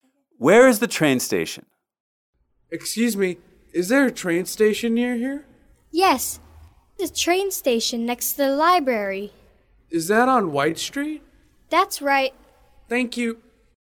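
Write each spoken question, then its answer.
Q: Where is the train station?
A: Next to the library on White Street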